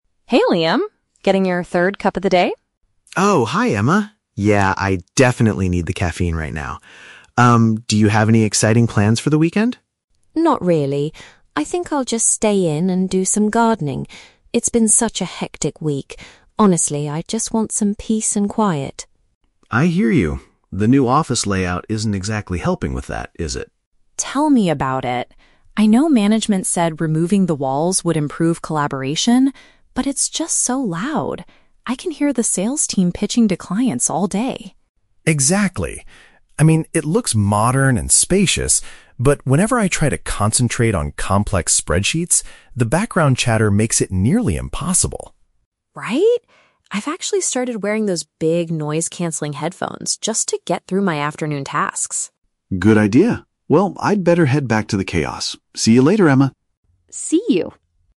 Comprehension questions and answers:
Listen to the conversation between two colleagues and choose the correct answer (A, B, or C).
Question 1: What is Emma planning to do this weekend?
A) Go out to a quiet cafe to relax.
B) Spend time taking care of her plants at home.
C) Visit a local park with her friends.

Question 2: What is the main problem with the open-plan office according to the speakers?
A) The lack of physical barriers creates too much distracting noise.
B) It prevents different departments from communicating effectively.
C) The workspace looks too old-fashioned and cramped.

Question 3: How does Emma deal with the current situation in the office?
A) She frequently complains to the sales team about their volume.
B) She asks the management to bring the individual desks back.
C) She uses an audio device to block out the surrounding sounds.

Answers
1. B
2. A
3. C

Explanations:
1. Emma says she will "stay in and do some gardening." Option B paraphrases this by saying she will "take care of her plants at home." Why the trap is wrong: Option (A) is a trap. The audio mentions she wants "peace and quiet," but she plans to stay home, not go out to a cafe. Option (C) is a plausible weekend activity but was never mentioned.
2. The speakers complain that "removing the walls" makes it "so loud" and the "background chatter" makes it hard to "concentrate." This matches the idea of missing physical barriers causing distracting noise. Why the trap is wrong: Option (B) is a trap because management actually hoped the new layout would "improve collaboration" (communicate effectively), not prevent it. Option (C) is the opposite of the script, as Liam mentions the office looks "modern and spacious."
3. Emma states that she wears "big noise-canceling headphones" to get through her tasks. Option C uses synonyms ("audio device", "block out surrounding sounds") to express this action. Why the trap is wrong: Option (A) is a trap. While Emma mentions hearing the sales team, she never says she complains directly to them. Option (B) is a logical action for someone who dislikes the open office, but it is not mentioned in the audio.

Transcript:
Emma: Hey Liam! Getting your third cup of the day?
Liam: Oh, hi Emma. Yeah, I definitely need the caffeine right now. Um, do you have any exciting plans for the weekend?
Emma: Not really. I think I'll just stay in and do some gardening. It's been such a hectic week. Honestly, I just want some peace and quiet.
Liam: I hear you. The new office layout isn't exactly helping with that, is it?
Emma: Tell me about it! I know management said removing the walls would improve collaboration, but it's just so loud. I can hear the sales team pitching to clients all day.
Liam: Exactly. I mean, it looks modern and spacious, but whenever I try to concentrate on complex spreadsheets, the background chatter makes it nearly impossible.
Emma: Right? I've actually started wearing those big noise-canceling headphones just to get through my afternoon tasks.
Liam: Good idea. Well, I'd better head back to the chaos. See you later, Emma!
Emma: See you!

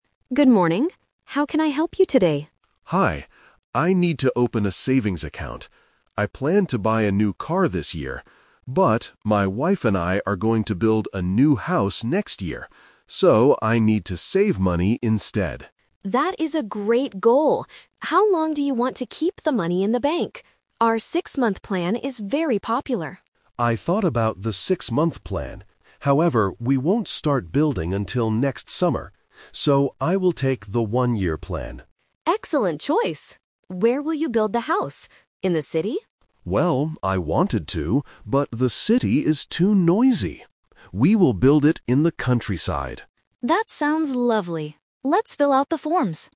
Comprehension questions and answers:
Listen to the conversation between a bank teller and a customer. Choose the correct answer (A, B, or C) for each question.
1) What is the customer going to do next year?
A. Buy a new car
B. Build a new house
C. Start a new business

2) Which savings plan does the customer choose?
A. A six-month plan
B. A one-year plan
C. A five-year plan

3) Where will the customer build the house?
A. In the city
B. In the countryside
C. Near the beach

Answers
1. B
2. B
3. B

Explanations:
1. The customer mentions that he planned to buy a new car (The Trap). However, he uses "But" to change the plan, stating that he and his wife are "going to build a new house next year." Starting a new business is not mentioned.
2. The teller suggests the six-month plan, and the customer says he thought about it (The Trap). He uses "However" to explain they need more time. He confirms his final decision by saying, "So, I will take the one-year plan." A five-year plan is not mentioned.
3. The teller asks if they will build in the city, and the customer says "I wanted to" (The Trap). But he rejects the city because it is too noisy. His final decision is: "We will build it in the countryside." The beach is not mentioned in the audio.

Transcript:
Teller: Good morning. How can I help you today?
Customer: Hi. I need to open a savings account. I planned to buy a new car this year. But, my wife and I are going to build a new house next year. So, I need to save money instead.
Teller: That is a great goal! How long do you want to keep the money in the bank? Our six-month plan is very popular.
Customer: I thought about the six-month plan. However, we won't start building until next summer. So, I will take the one-year plan.
Teller: Excellent choice. Where will you build the house? In the city?
Customer: Well, I wanted to, but the city is too noisy. We will build it in the countryside.

